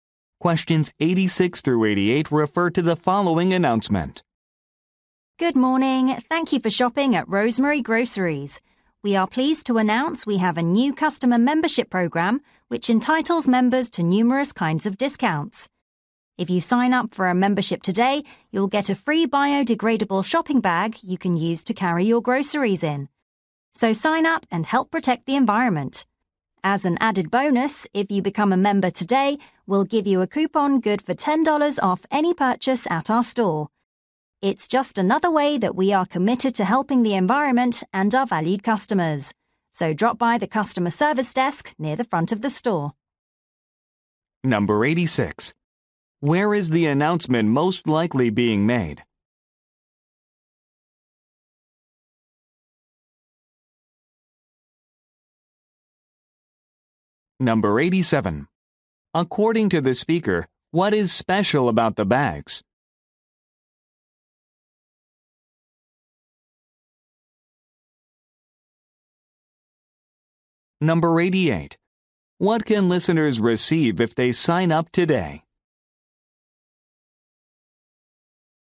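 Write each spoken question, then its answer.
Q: Where is the announcement most likely being made?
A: At a grocery store

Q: According to the speaker, what is special about the bags?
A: They are biodegradable

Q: What can listeners receive if they sign up today?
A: A $10 coupon (and a free shopping bag)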